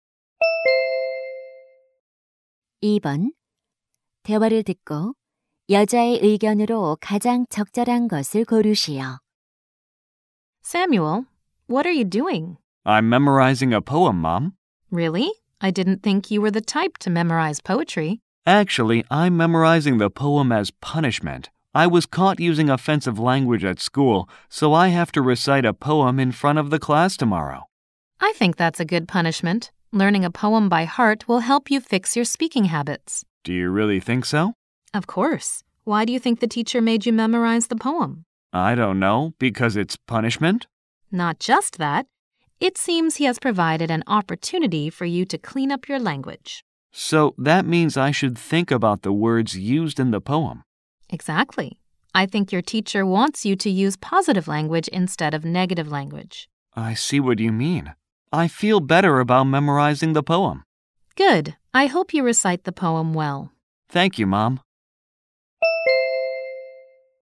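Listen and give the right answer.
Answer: 시를 외우는 것은 언어 습관을 고치는 데 도움이 된다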